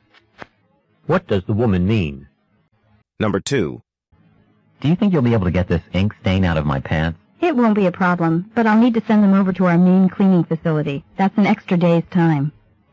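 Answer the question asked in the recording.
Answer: The stain can be removed, but it will take an extra day.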